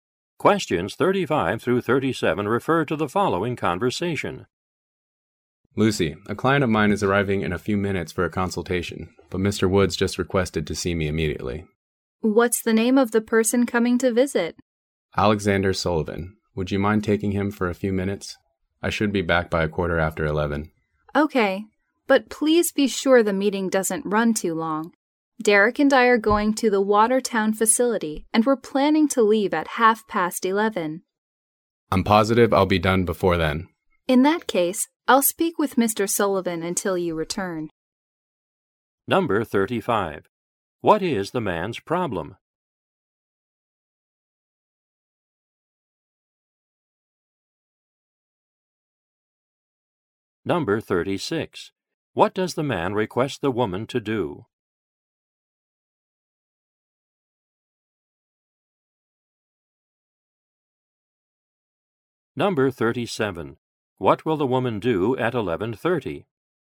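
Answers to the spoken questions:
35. A client is arriving but he must see Mr. Woods immediately
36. Meet with his client until he returns
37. Leave for the Watertown facility with Derek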